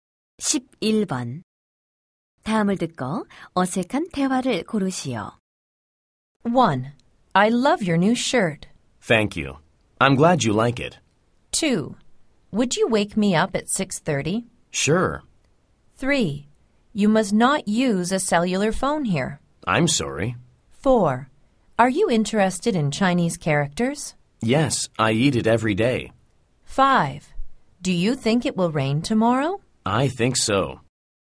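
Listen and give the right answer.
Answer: 4: Are you interested in Chinese characters? / Yes, I eat it every day.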